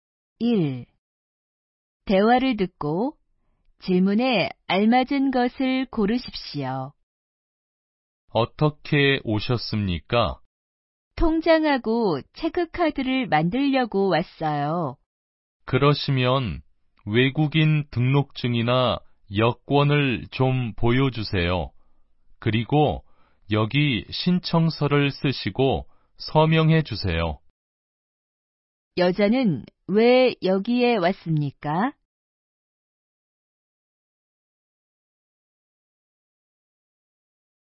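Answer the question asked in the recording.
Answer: 통장하고 체크카드를 만들려고 왔습니다.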